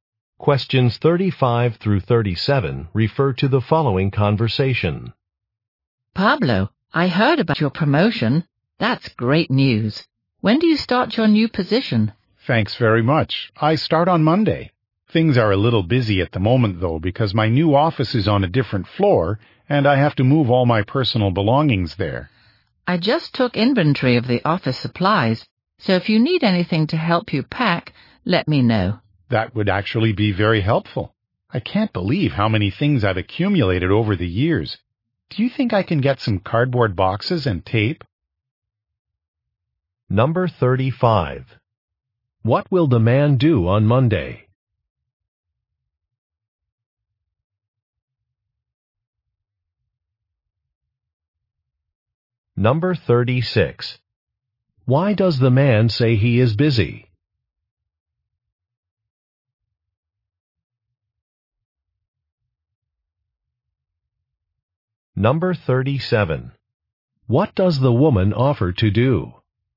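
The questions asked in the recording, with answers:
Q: What will the man do on Monday?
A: Start a new position

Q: Why does the man say he is busy?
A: He has to move his belongings to a new office

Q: What does the woman offer to do?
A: Provide supplies for packing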